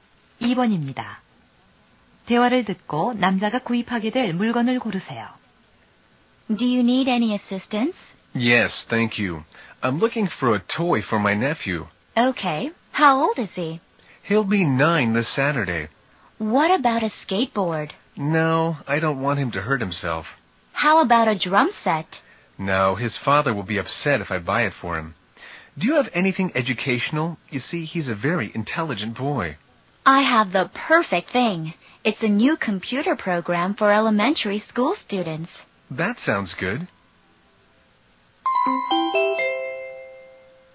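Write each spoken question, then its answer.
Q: 대화를 듣고 남자가 구입하게 될 물건을 고르세요.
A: 초등학생용 컴퓨터 프로그램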